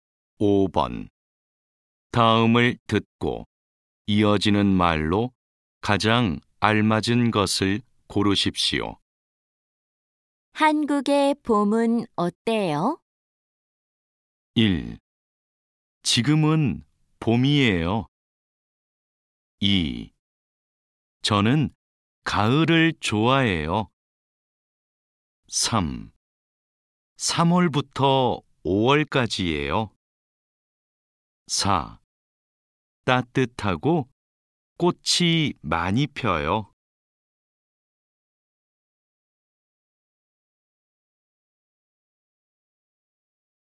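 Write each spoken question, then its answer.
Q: 한국의 봄은 어때요?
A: 4: 따뜻하고 꽃이 많이 펴요.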